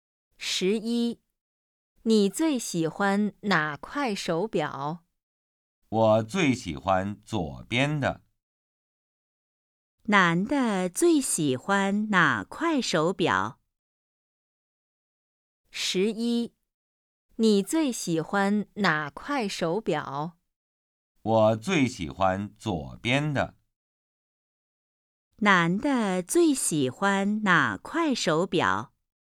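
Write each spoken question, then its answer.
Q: 男的最喜欢哪块手表?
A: 左边的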